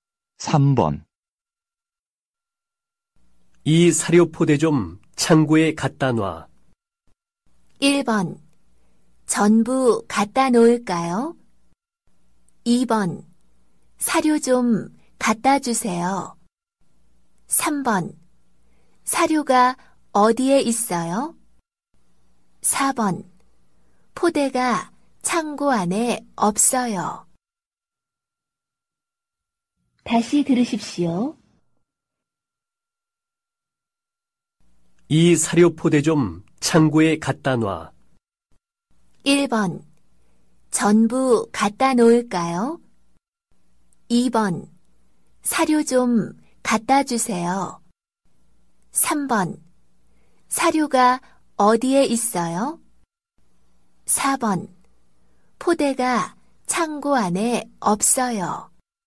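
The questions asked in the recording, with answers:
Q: 이 사료 포대 좀 창고에 갖다 놔.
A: 1: 전부 갖다 놓을까요?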